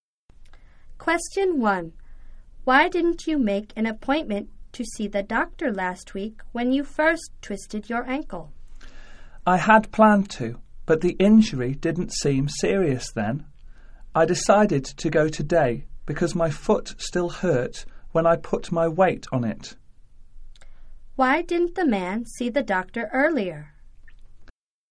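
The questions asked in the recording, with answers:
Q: Why didn't the man see the doctor earlier?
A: He didn't think the injury was serious at first.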